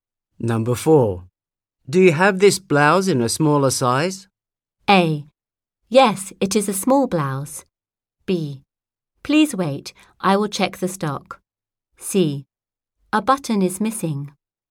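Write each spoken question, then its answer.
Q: Do you have this blouse in a smaller size?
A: B: Please wait, I will check the stock.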